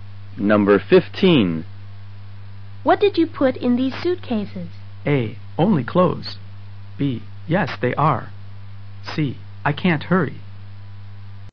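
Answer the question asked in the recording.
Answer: A: Only clothes.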